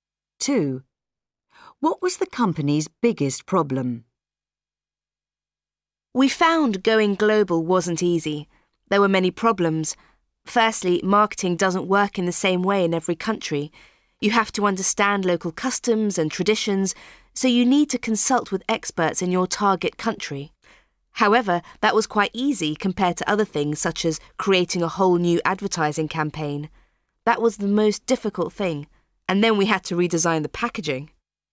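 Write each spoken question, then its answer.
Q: What was the company's biggest problem?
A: Creating a whole new advertising campaign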